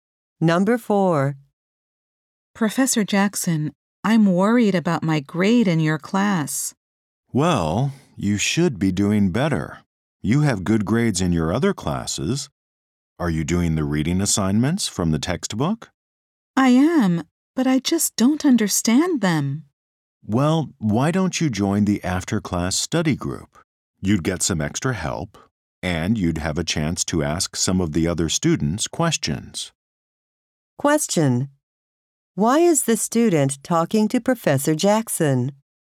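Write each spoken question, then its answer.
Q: Why is the student talking to Professor Jackson?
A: The student is worried about the grade in the class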